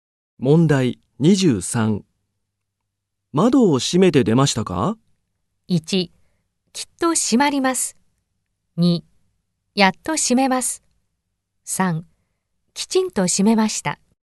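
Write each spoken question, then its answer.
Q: 窓を閉めて出ましたか?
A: 3: きちんと閉めました。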